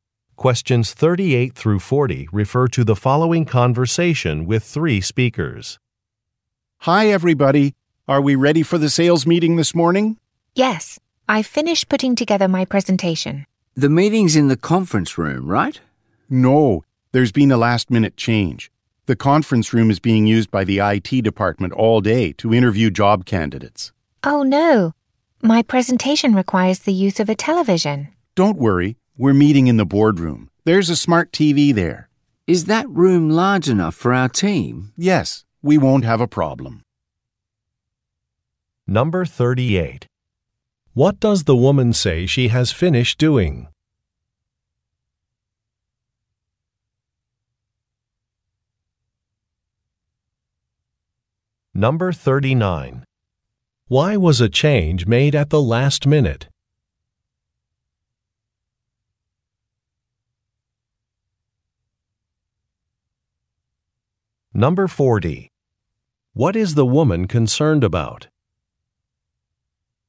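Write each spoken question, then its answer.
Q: What does the woman say she has finished doing?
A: Putting together her presentation

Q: Why was a change made at the last minute?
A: The conference room is being used by IT for job interviews

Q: What is the woman concerned about?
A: Her presentation needs a television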